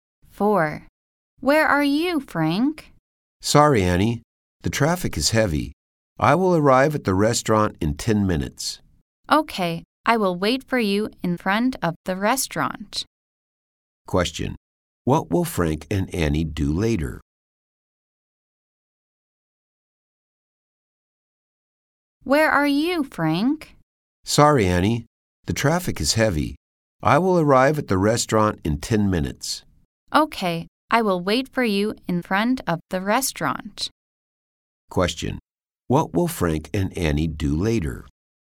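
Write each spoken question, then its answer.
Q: What will Frank and Annie do later?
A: Meet at the restaurant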